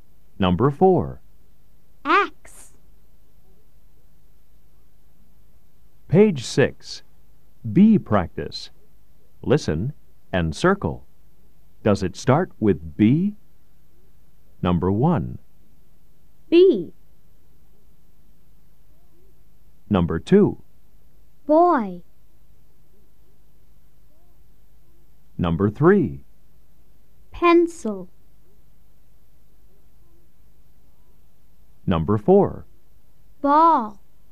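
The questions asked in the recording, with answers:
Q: Does it start with B?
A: Yes (boy)

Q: Does it start with B?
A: No (pencil)

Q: Does it start with B?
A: Yes (ball)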